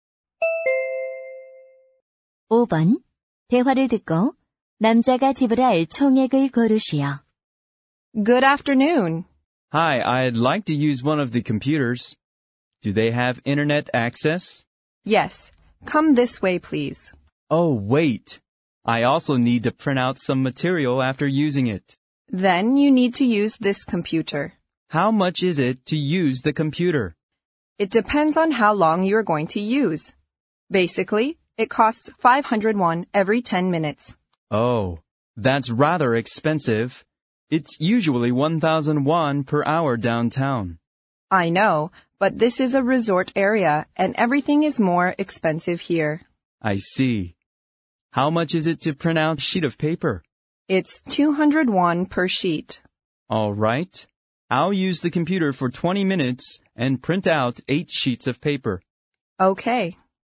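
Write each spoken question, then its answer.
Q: 대화를 듣고 남자가 지불할 총액을 고르시오.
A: 2,600원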